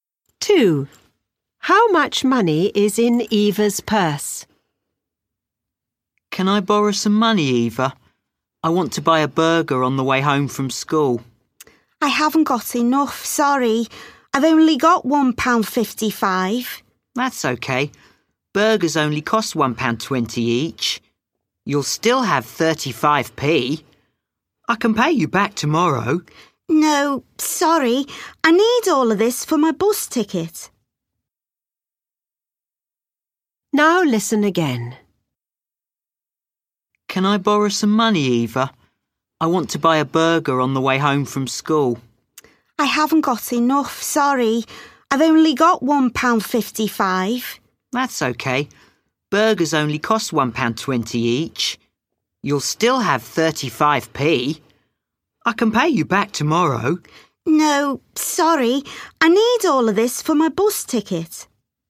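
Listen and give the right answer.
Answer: £1.55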